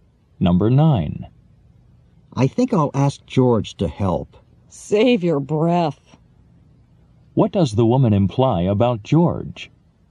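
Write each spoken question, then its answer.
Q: What does the woman imply about George?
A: George won't help, so asking is pointless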